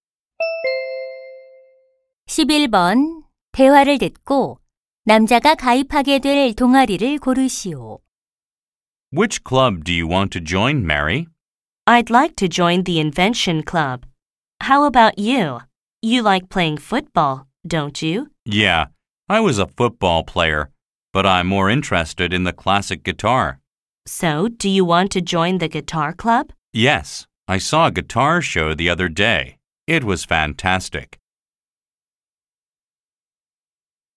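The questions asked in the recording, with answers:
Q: 대화를 듣고 남자가 가입하게 될 동아리를 고르시오.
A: 기타 동아리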